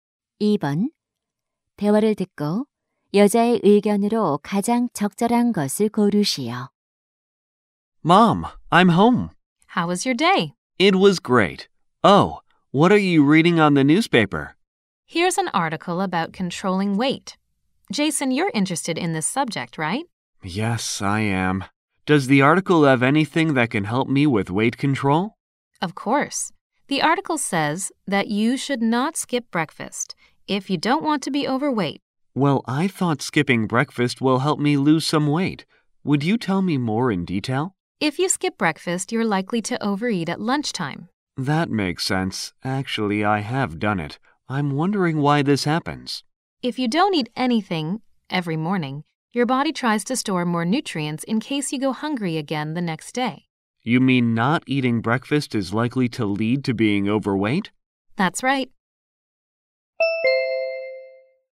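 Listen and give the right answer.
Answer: 아침을 거르면 오히려 체중이 늘 수 있다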